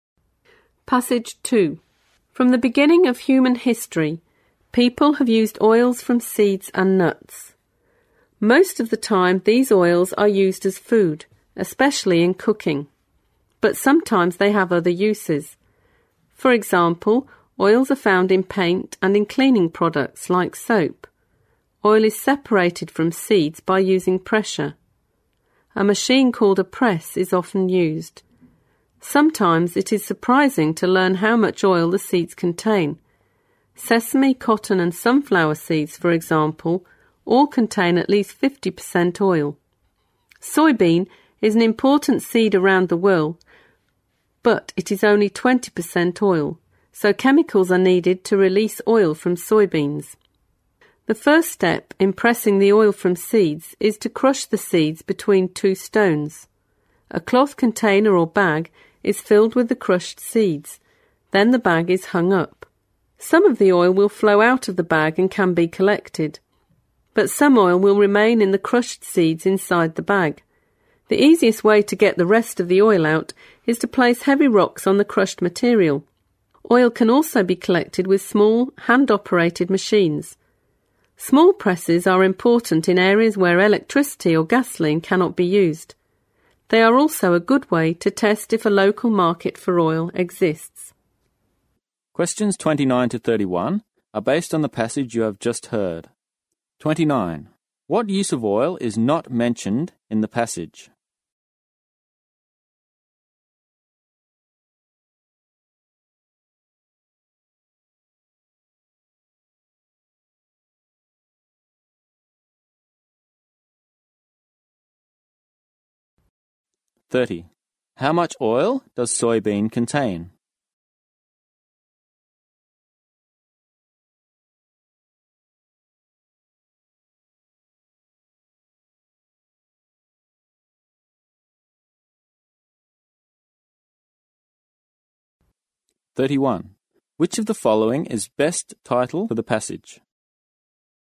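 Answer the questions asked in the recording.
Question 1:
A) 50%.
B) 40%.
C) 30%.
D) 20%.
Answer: D) 20%.
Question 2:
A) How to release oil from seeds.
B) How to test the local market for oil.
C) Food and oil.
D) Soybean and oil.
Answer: A) How to release oil from seeds.
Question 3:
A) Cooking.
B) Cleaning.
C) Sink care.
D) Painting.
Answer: C) Sink care.

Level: 四级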